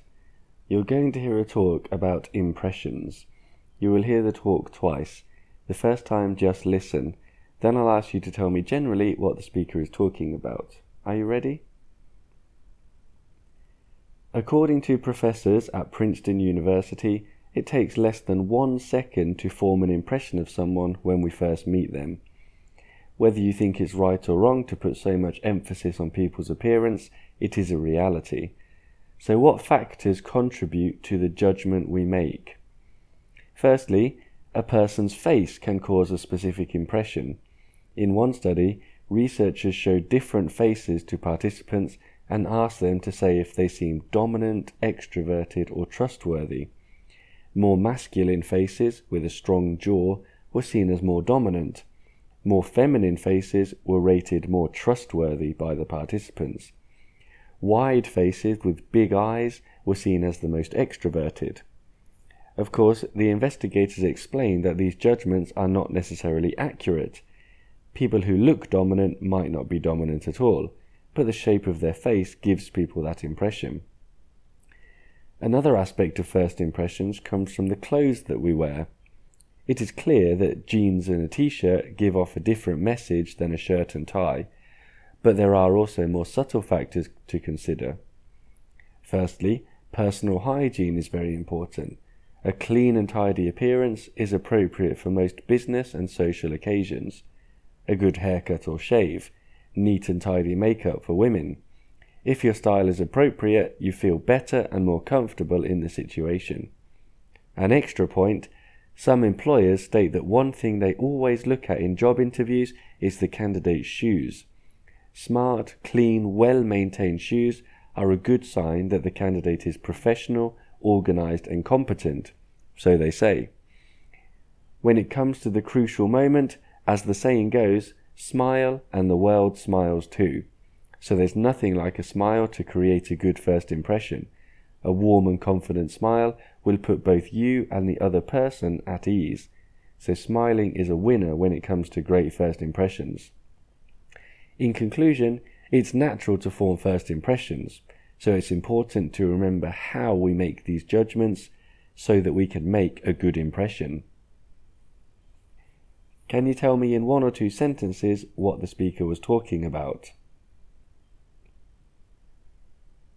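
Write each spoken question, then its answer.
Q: Can you tell me in one or two sentences what the speaker was talking about?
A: How people form first impressions and what affects them: faces, clothes and appearance, and smiling.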